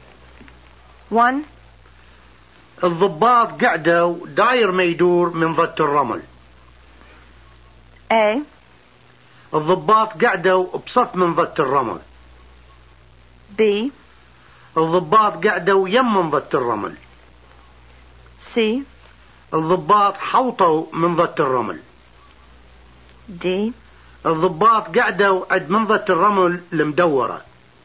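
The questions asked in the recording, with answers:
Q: الضباط قعدوا داير ما يدور من ضد الرمل.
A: C: الضباط حوطوا من ضد الرمل.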